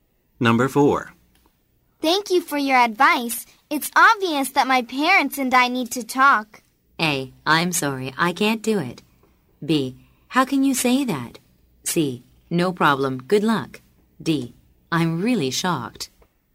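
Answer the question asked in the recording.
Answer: C: No problem, good luck.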